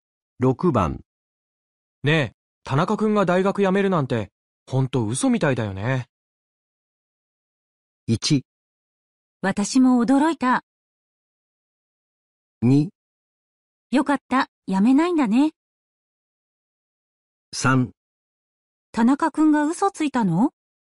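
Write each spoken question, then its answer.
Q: ねえ、田中くんが大学辞めるなんて、ほんと嘘みたいだよね。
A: 1: 私も驚いた。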